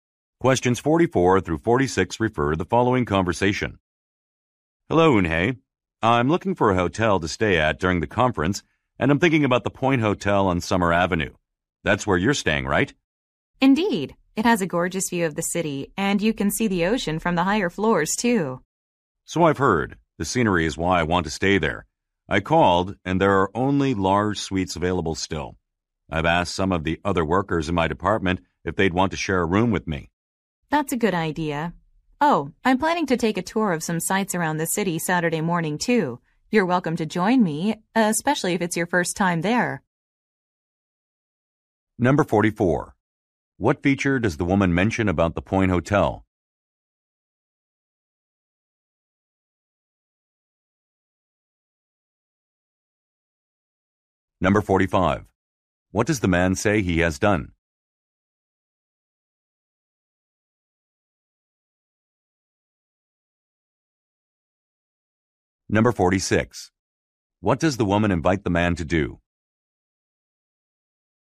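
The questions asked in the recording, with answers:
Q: What feature does the woman mention about the Point Hotel?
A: A gorgeous view of the city and ocean

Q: What does the man say he has done?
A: Asked coworkers to share a room

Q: What does the woman invite the man to do?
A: Join her on a city tour Saturday morning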